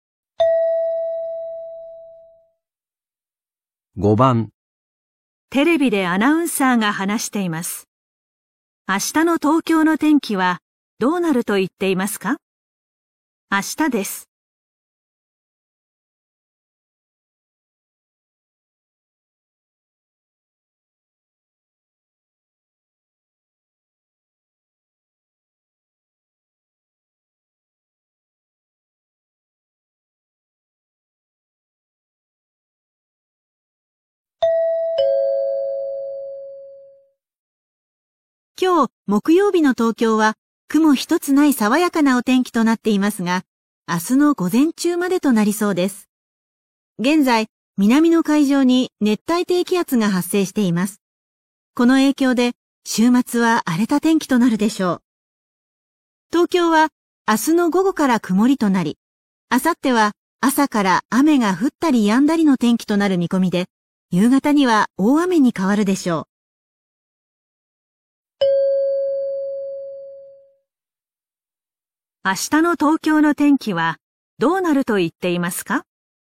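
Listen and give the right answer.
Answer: 午前中は晴れ、午後から曇り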